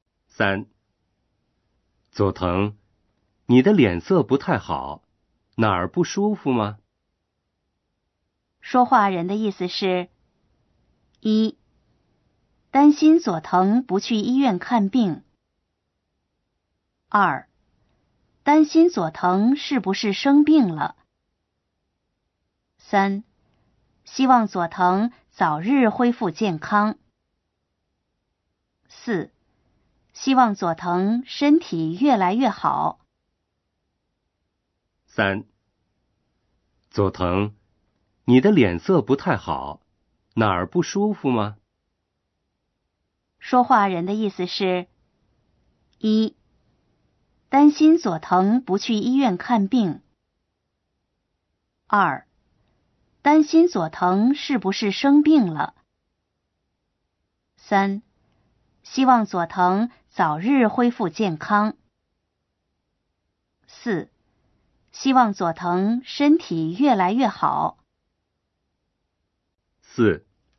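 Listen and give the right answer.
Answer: 二: 担心佐藤是不是生病了。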